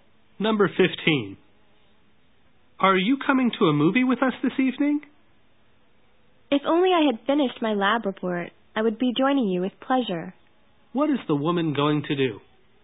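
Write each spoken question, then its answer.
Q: What is the woman going to do?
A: Finish her lab report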